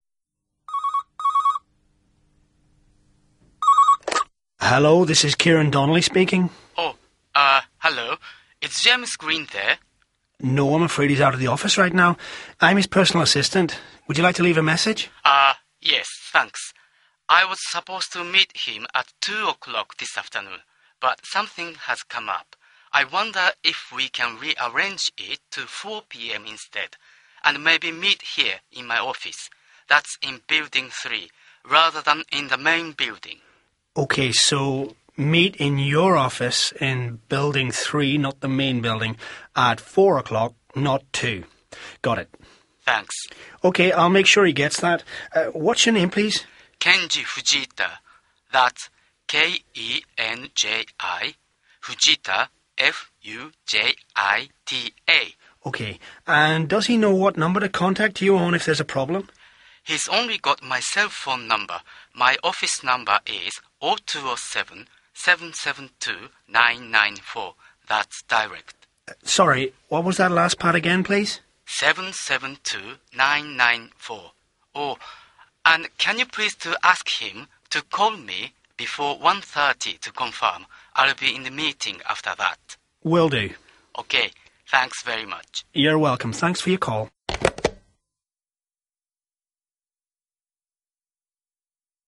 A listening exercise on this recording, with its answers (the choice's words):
1. Listen to Kieran, a personal assistant, take a telephone message. What does the caller want to do?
What does the caller want to do?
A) Set up a meeting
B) Change some arrangements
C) Complain about a problem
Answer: Change some arrangements